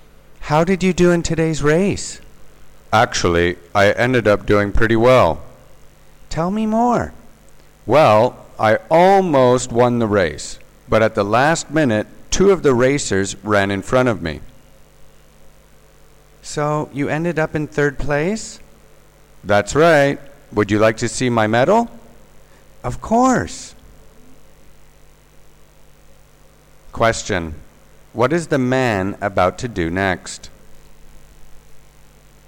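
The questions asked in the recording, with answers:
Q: What is the man about to do next?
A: Show his medal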